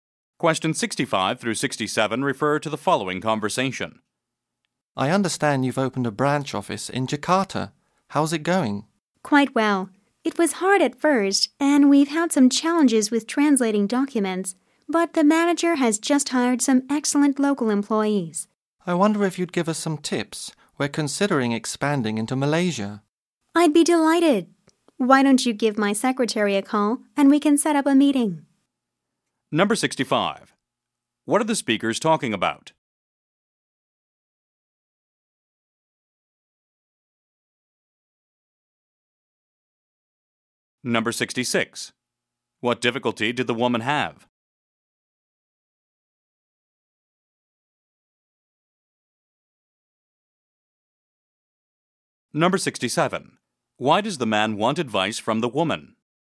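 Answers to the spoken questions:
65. A new branch office in Jakarta
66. Translating documents
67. His company is considering expanding into Malaysia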